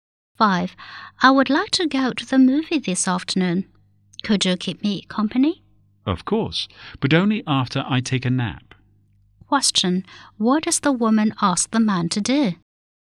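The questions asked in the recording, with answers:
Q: What does the woman ask the man to do?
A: Go to the movie with her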